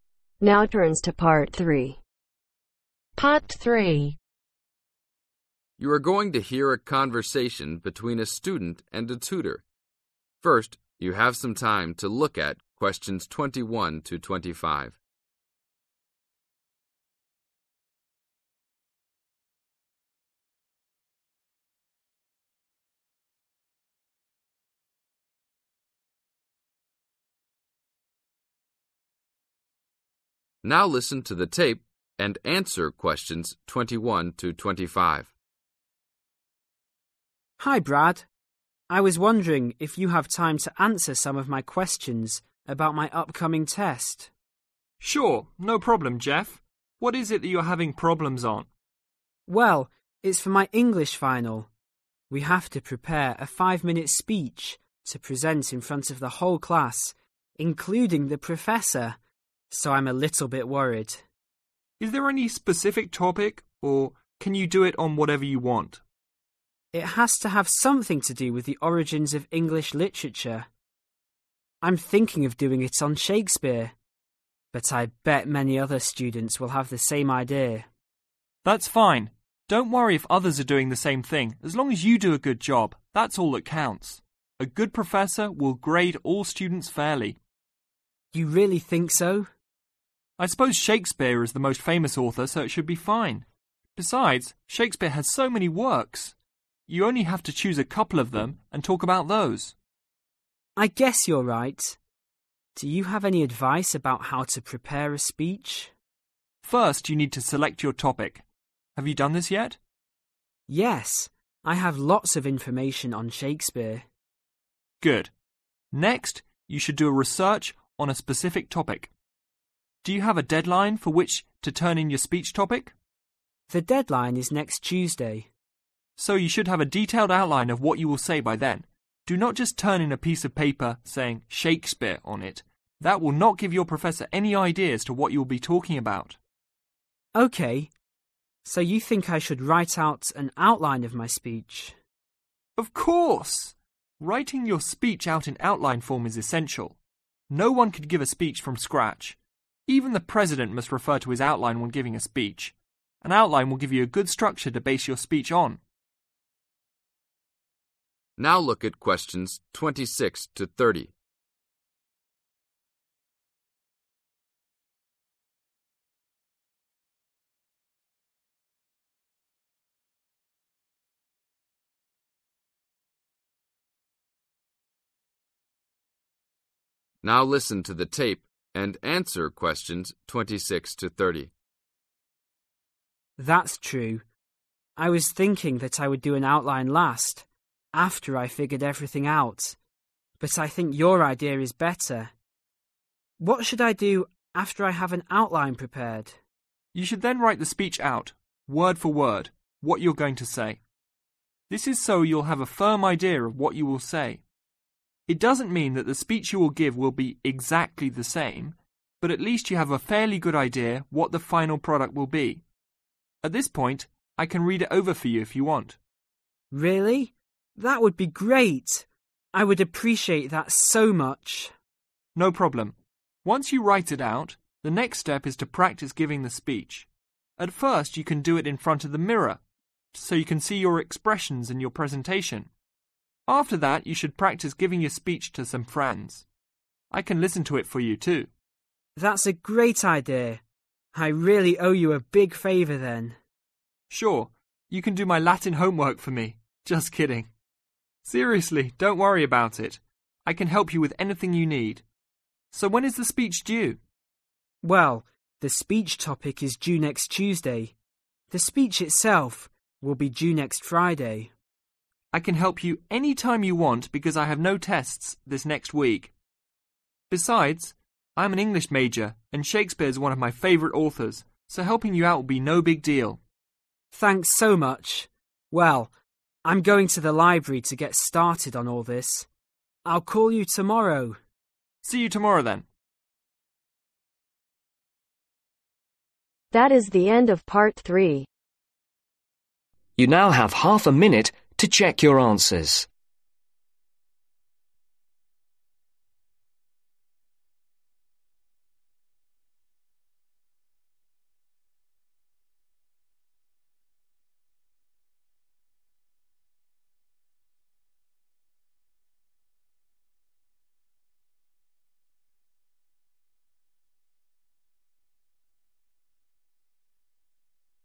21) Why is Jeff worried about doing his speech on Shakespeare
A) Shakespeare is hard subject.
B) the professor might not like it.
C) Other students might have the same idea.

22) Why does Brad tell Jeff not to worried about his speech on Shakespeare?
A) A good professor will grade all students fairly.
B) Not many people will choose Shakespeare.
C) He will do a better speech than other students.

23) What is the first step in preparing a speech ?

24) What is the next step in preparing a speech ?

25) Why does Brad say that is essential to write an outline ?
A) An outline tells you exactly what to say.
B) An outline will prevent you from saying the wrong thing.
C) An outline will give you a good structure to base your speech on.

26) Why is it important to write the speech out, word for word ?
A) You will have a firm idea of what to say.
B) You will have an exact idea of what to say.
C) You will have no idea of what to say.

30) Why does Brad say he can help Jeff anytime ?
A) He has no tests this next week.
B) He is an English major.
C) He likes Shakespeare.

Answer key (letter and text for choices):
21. C) Other students might have the same idea.
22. A) A good professor will grade all students fairly.
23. select your topic
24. do a research/ research a topic
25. C) An outline will give you a good structure to base your speech on.
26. A) You will have a firm idea of what to say.
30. A) He has no tests this next week.